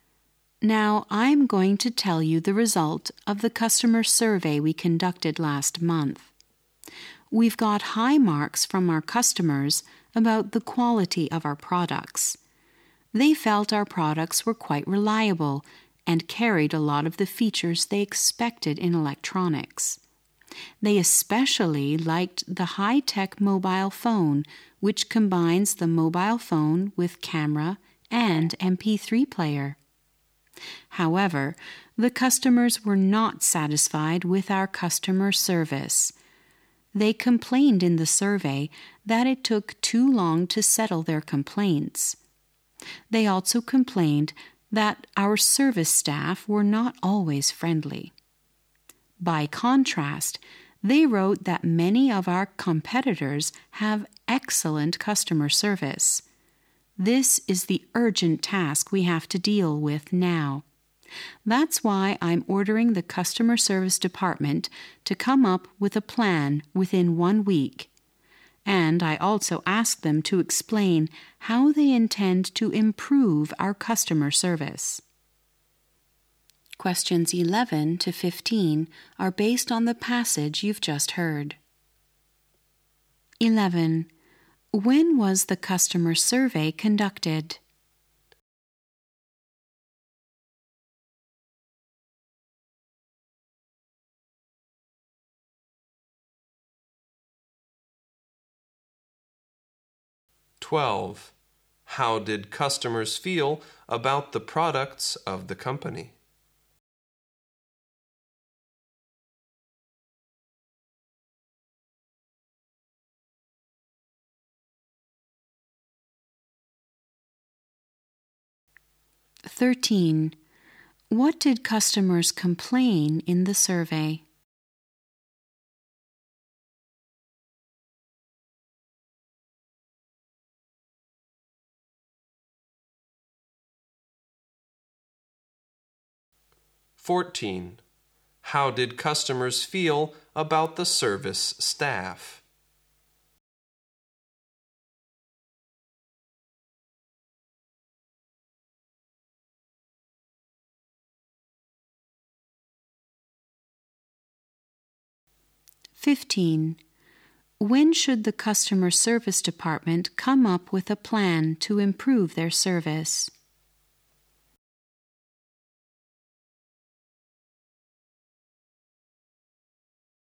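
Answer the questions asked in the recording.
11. Last month
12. Quite reliable
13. It took too long to settle complaints
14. Not always friendly
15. Within 1 week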